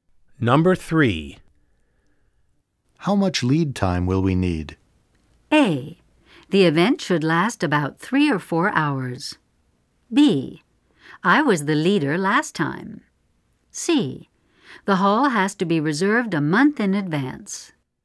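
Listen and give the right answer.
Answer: C: The hall has to be reserved a month in advance.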